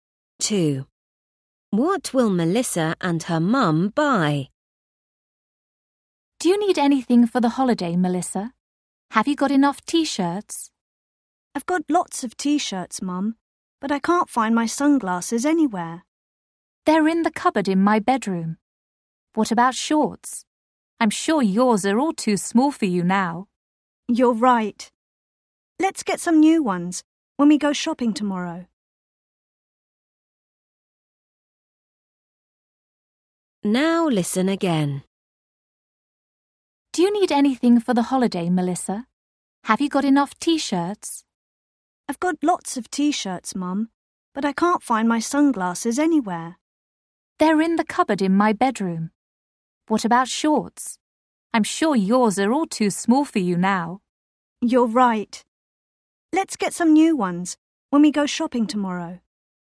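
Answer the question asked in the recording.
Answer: shorts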